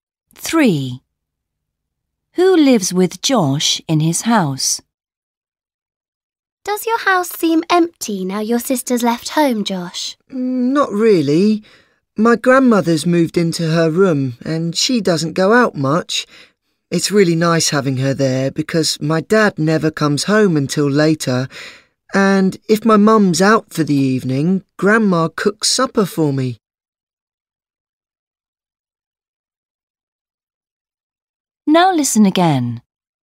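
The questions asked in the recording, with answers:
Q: Who lives with Josh in his house?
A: his grandmother (and his parents)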